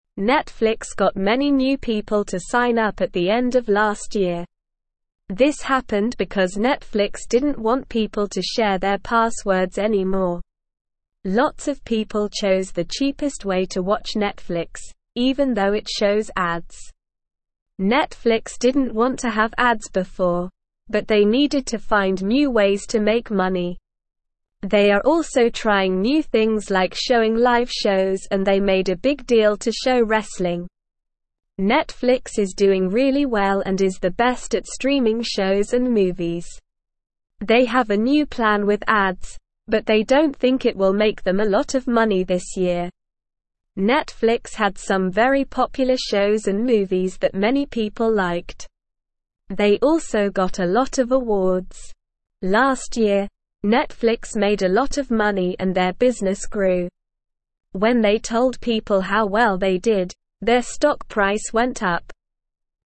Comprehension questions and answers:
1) Netflix got (1)______ new people to sign up at the end of last year.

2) This happened because Netflix didn't want people to share their (2)______ anymore.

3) Netflix didn't want to have ads before, but they (3)______ to find new (4)______ to make money.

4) Netflix didn't want to have ads before, but they (3)______ to find new (4)______ to make money.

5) They (5)______ a new plan with ads, but they don't think it will make them a lot of (6)______ this year.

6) They (5)______ a new plan with ads, but they don't think it will make them a lot of (6)______ this year.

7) Last year, Netflix (7)______ a lot of money and their business grew.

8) When they told people how well they did, their stock price (8)______ up.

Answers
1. many
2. passwords
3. needed
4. ways
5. have
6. money
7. made
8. went

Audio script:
Netflix got many new people to sign up at the end of last year. This happened because Netflix didn't want people to share their passwords anymore. Lots of people chose the cheapest way to watch Netflix, even though it shows ads. Netflix didn't want to have ads before, but they needed to find new ways to make money. They are also trying new things like showing live shows and they made a big deal to show wrestling.
Netflix is doing really well and is the best at streaming shows and movies. They have a new plan with ads, but they don't think it will make them a lot of money this year. Netflix had some very popular shows and movies that many people liked. They also got a lot of awards. Last year, Netflix made a lot of money and their business grew. When they told people how well they did, their stock price went up.

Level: Level 1